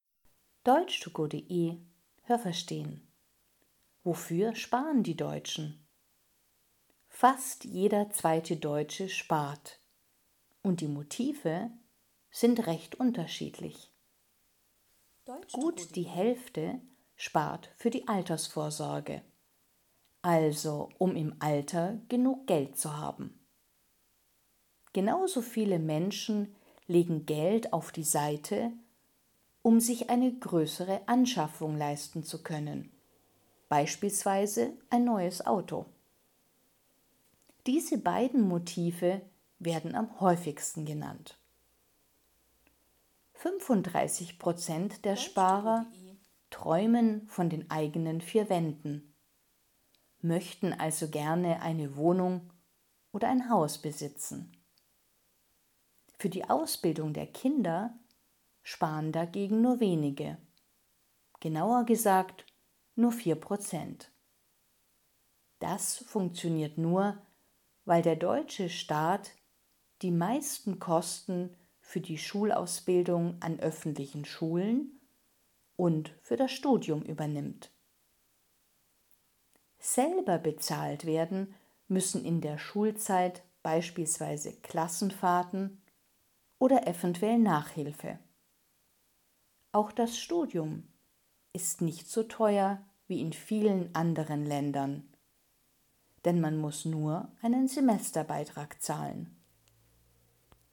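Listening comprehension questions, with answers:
Haben Sie das gehört? Stimmt diese Aussage?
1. Nur zwei Prozent der Deutschen sparen.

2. Am häufigsten sparen die Deutschen für ihr Alter oder für ein Auto.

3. 35 Prozent der Deutschen wollen sich eine eigene Wohnung oder ein eigenes Haus kaufen.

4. 40 Prozent der Deutschen sparen für die Ausbildung der Kinder.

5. Der deutsche Staat zahlt die Schulausbildung an öffentlichen Schulen.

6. Eltern müssen für ihre Kinder Klassenfahrten und Nachhilfe selber bezahlen.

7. Das Studium in Deutschland ist teurer als in vielen anderen Ländern.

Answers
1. falsch
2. falsch
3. richtig
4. falsch
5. richtig
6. richtig
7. falsch

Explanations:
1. Fast jeder zweite Deutsche spart, das sind fast 50 %.
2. Sie sparen für ihr Alter und für größere Anschaffungen. Das Auto ist nur ein Beispiel.
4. Das sind nur 4 Prozent.
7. Es ist nicht so teuer wie in vielen anderen Ländern. 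Denn die meisten Kosten übernimmt der Staat. Man muss nur einen Semesterbeitrag bezahlen.

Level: Hörtexte A (einfach)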